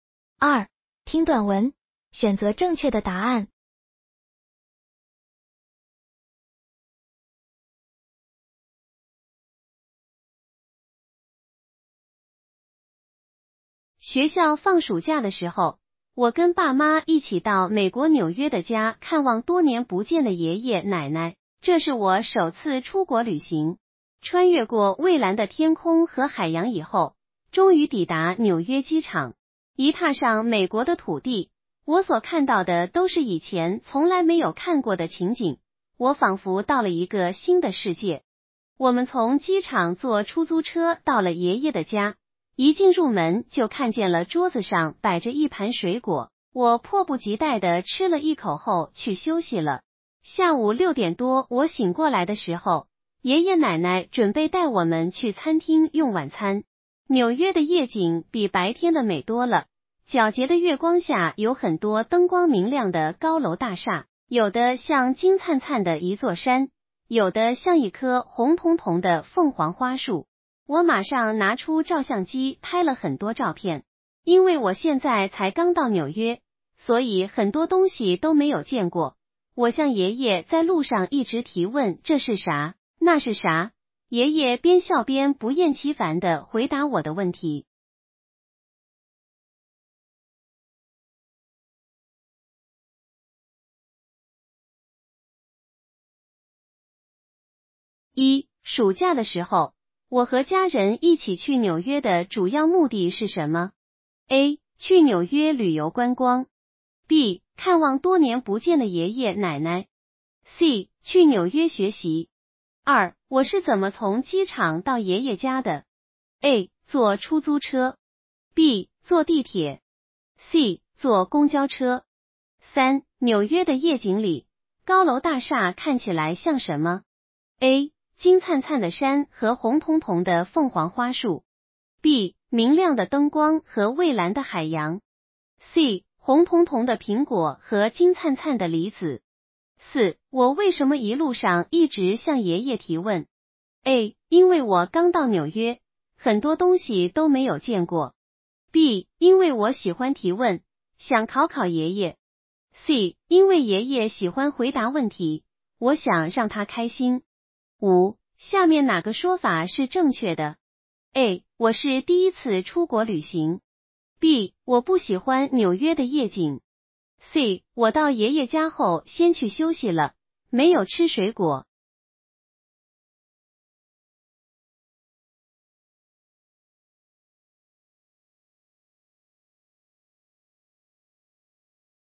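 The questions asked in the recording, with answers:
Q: 暑假的时候,我和家人一起去纽约的主要目的是什么?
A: B: 看望多年不见的爷爷奶奶。

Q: 我是怎么从机场到爷爷家的?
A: A: 坐出租车。

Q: 纽约的夜景里,高楼大厦看起来像什么?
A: A: 金灿灿的山和红彤彤的凤凰花树。

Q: 我为什么一路上一直向爷爷提问?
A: A: 因为我刚到纽约,很多东西都没有见过。

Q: 下面哪个说法是正确的?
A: A: 我是第一次出国旅行。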